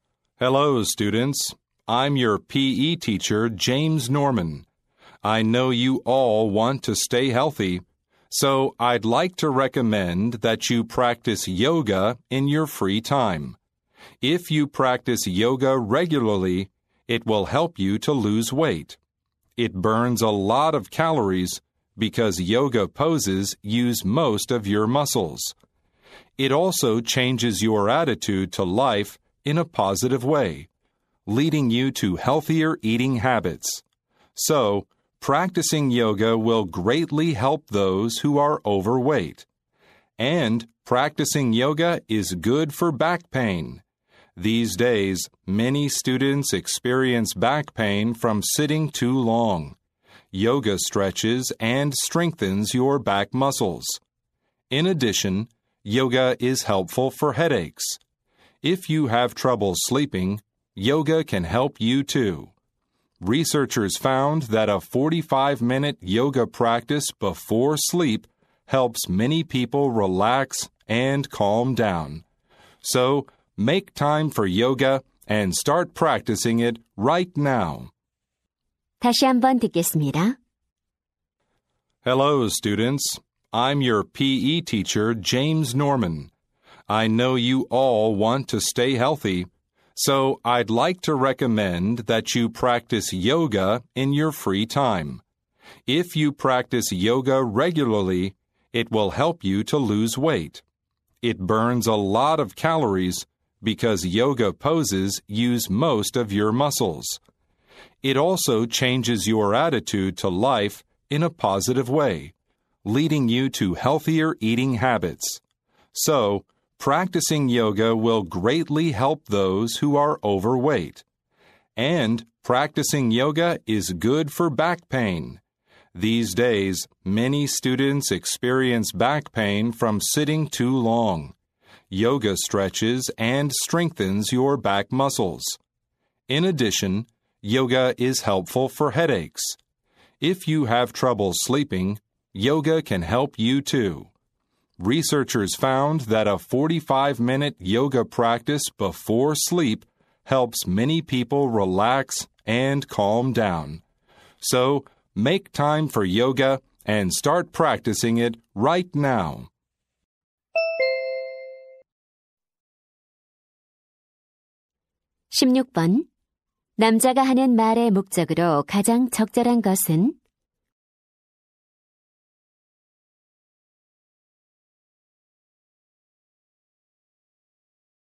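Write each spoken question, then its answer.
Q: 남자가 하는 말의 목적으로 가장 적절한 것은?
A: 여가 시간에 요가를 할 것을 권하려고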